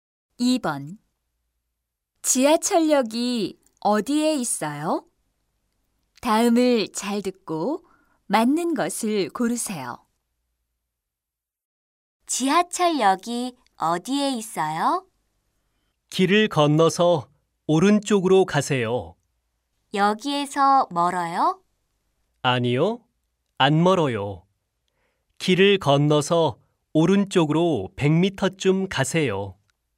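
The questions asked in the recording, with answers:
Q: 지하철역이 어디에 있어요?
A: 길을 건너서 오른쪽으로 100m쯤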